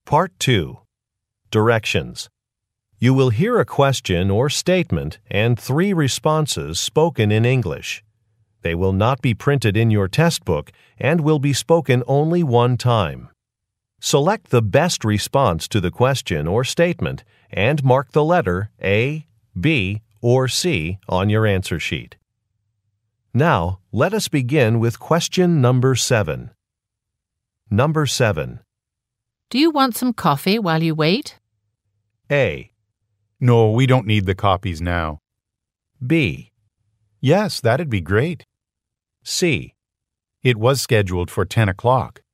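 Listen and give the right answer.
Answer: B. Yes, that'd be great.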